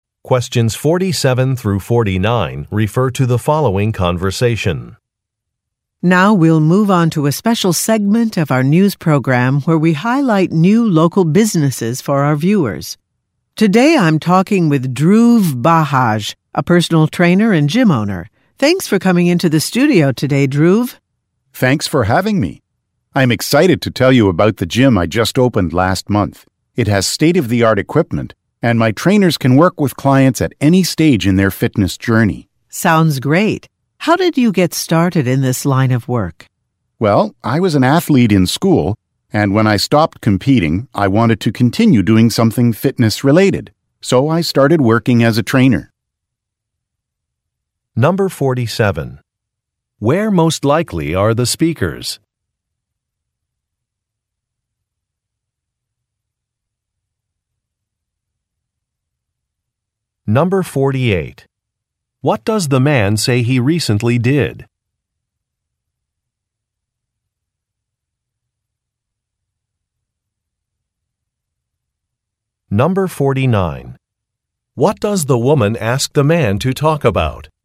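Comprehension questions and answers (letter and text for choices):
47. Where most likely are the speakers?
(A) At a sporting goods store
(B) At a television studio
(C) At a sports arena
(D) At a gym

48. What does the man say he recently did?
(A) He retired from his job.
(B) He designed a Web site.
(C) He opened a new facility.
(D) He competed in a sports event.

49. What does the woman ask the man to talk about?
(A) His career path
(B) His mentors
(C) His future goals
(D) His hobbies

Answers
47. (B) At a television studio
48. (C) He opened a new facility.
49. (A) His career path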